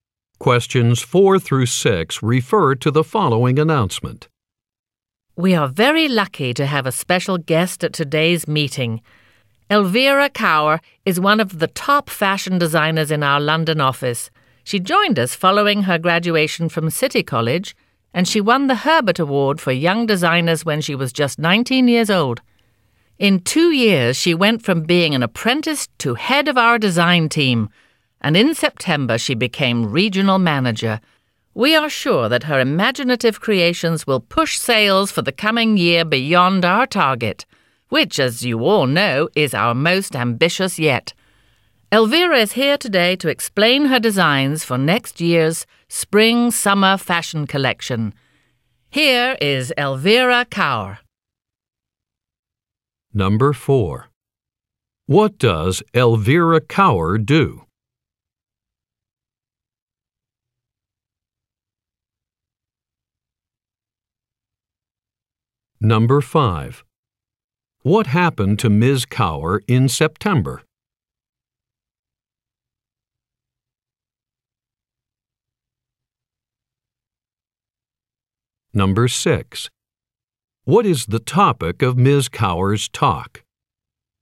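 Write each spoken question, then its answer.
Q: What does Elvira Kaur do?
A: She is a fashion designer

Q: What happened to Ms.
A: She became regional manager

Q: What is the topic of Ms. Kaur's talk?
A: Her designs for next year's spring-summer collection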